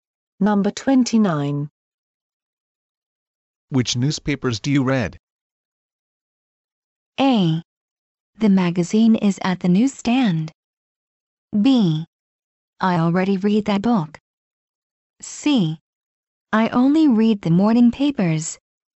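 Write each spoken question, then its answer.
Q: Which newspapers do you read?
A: C: I only read the morning papers.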